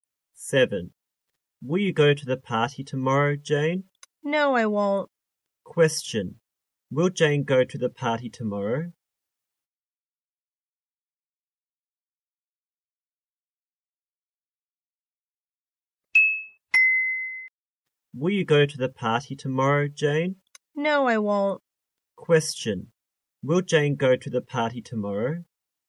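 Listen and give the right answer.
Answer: No, she won't.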